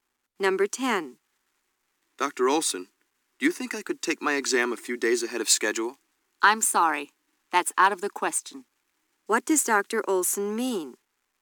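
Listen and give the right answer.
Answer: The student can't take the exam early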